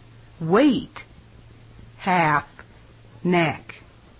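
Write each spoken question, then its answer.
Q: Wet, half, neck. Wait, half, neck.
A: wait (it should have been wet)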